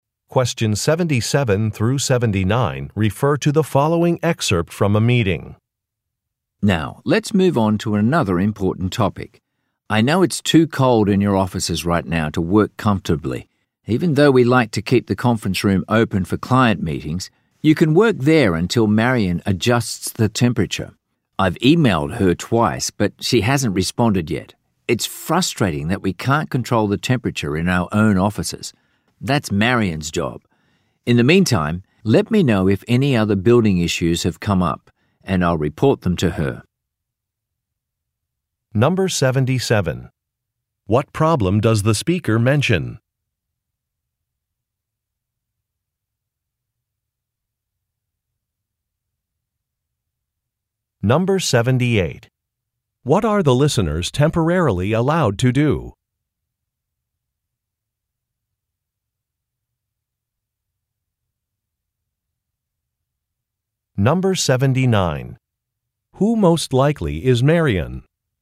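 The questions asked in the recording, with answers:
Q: What problem does the speaker mention?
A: The offices are too cold.

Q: What are the listeners temporarily allowed to do?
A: Work in the conference room.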